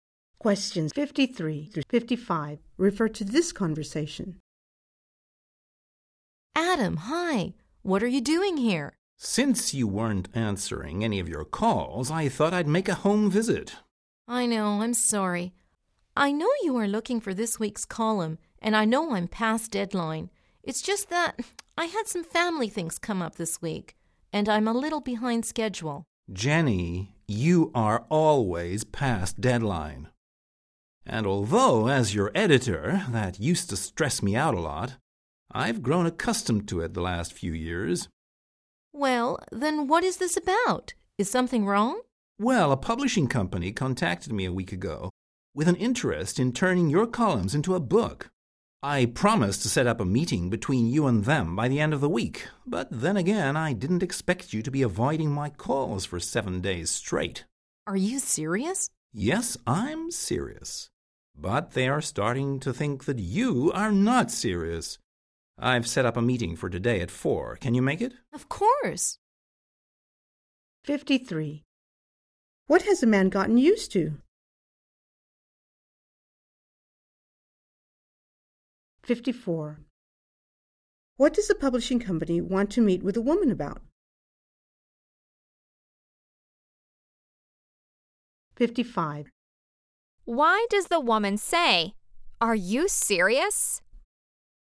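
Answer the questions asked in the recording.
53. The woman always missing deadlines
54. Turning her columns into a book
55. She is surprised and excited by the news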